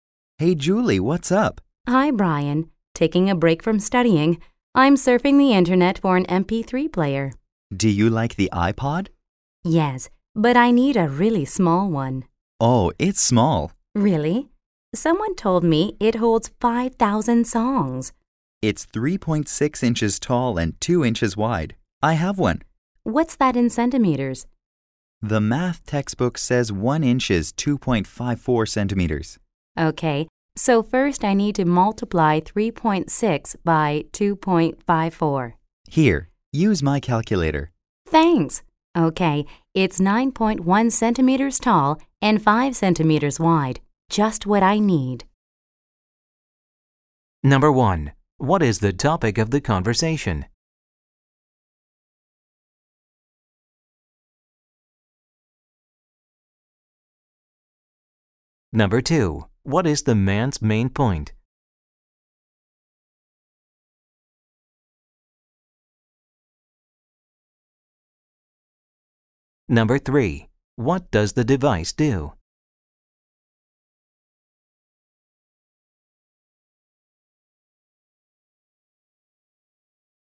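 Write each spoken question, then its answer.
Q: What is the topic of the conversation?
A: An MP3 player (the iPod) and its size

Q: What does the device do?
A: It plays music; it holds 5,000 songs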